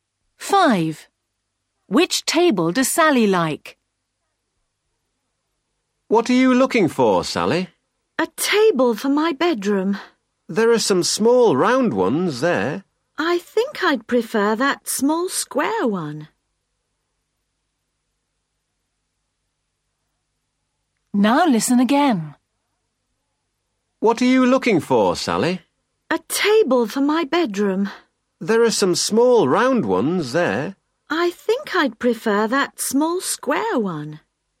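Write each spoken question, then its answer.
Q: Which table does Sally like?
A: The small square one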